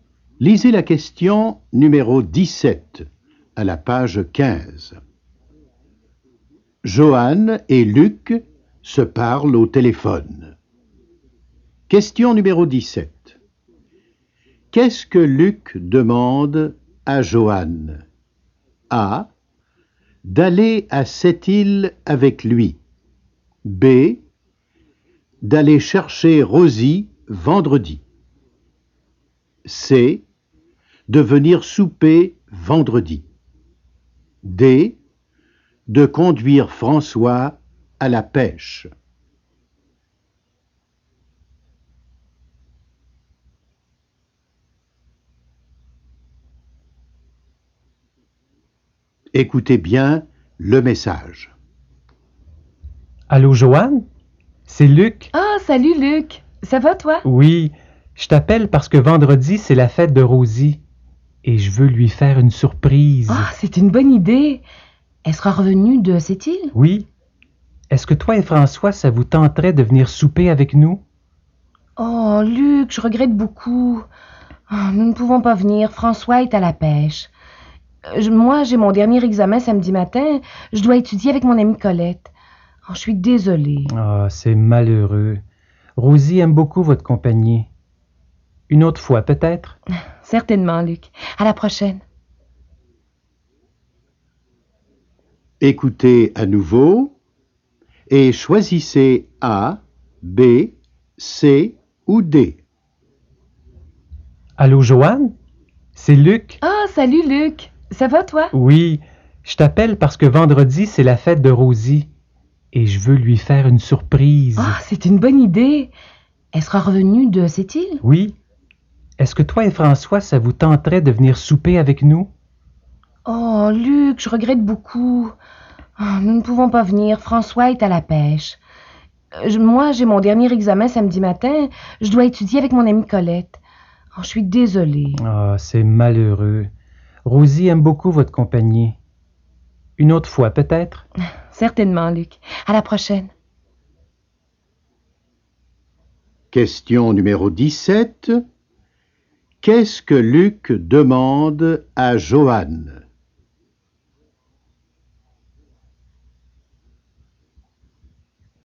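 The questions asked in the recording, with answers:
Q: Qu'est-ce que Luc demande à Johan?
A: C: De venir souper vendredi.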